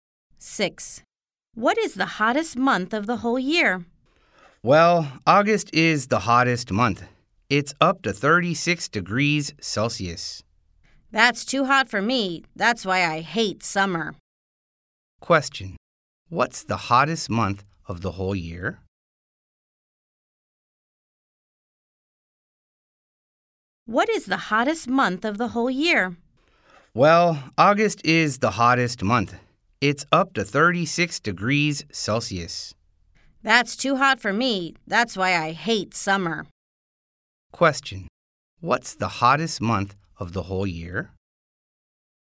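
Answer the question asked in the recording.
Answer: August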